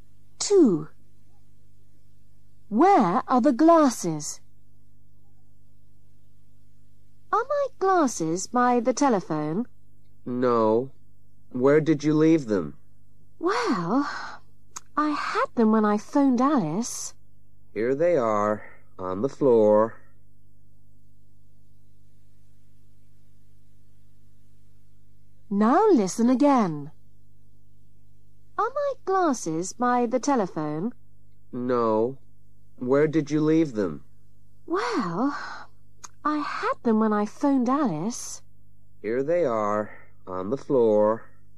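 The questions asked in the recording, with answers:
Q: Where are the glasses?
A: on the floor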